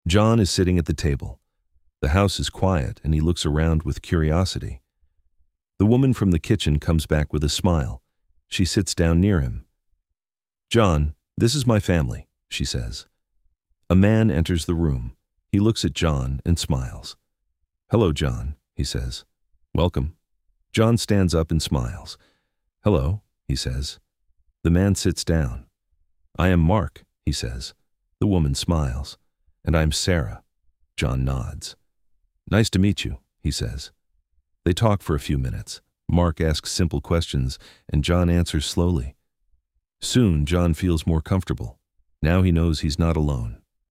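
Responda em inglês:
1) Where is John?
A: He is sitting at the table.

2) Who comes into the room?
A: A man (Mark).

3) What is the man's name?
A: Mark

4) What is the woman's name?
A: Sarah

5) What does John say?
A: Hello. Nice to meet you.

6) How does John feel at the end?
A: More comfortable

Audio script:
John is sitting at the table. The house is quiet, and he looks around with curiosity.
The woman from the kitchen comes back with a smile. She sits down near him.
"John, this is my family," she says.
A man enters the room. He looks at John and smiles.
"Hello, John," he says. "Welcome."
John stands up and smiles.
"Hello," he says.
The man sits down.
"I am Mark," he says.
The woman smiles. "And I am Sarah."
John nods.
"Nice to meet you," he says.
They talk for a few minutes. Mark asks simple questions, and John answers slowly.
Soon, John feels more comfortable. Now he knows he is not alone.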